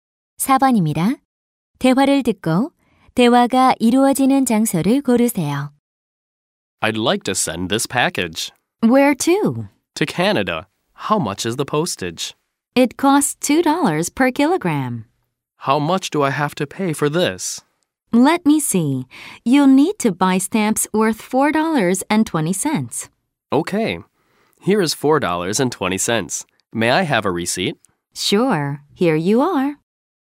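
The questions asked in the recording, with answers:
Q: 대화를 듣고 대화가 이루어지는 장소를 고르세요.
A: 우체국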